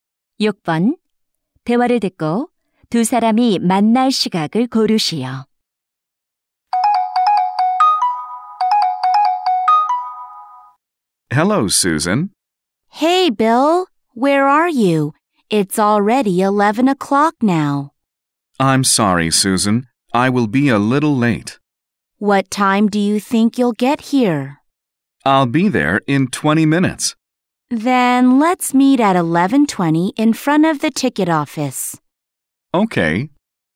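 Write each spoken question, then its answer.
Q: 대화를 듣고 두 사람이 만날 시각을 고르시오.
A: 11시 20분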